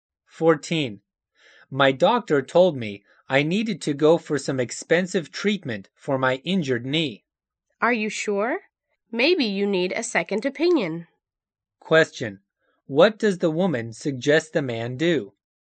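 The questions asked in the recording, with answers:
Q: What does the woman suggest the man do?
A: See another doctor.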